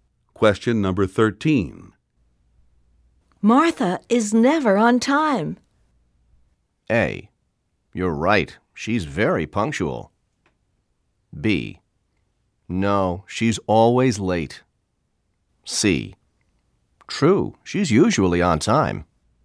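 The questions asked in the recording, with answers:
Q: Martha is never on time.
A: B: No, she's always late.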